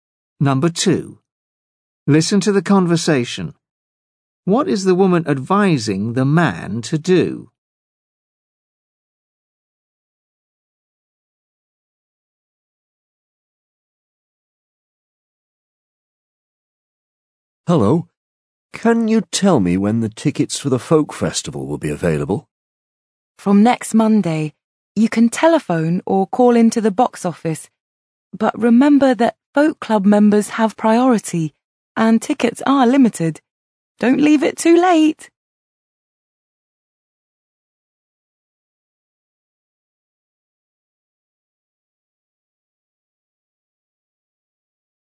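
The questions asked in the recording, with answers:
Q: What is the woman advising the man to do?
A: Book tickets early, before they run out.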